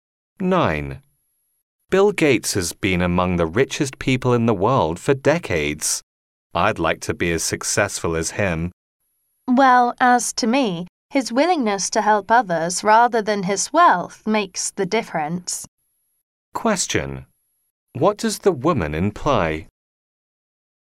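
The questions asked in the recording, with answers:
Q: What does the woman imply?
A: Gates's willingness to help others matters more than his wealth.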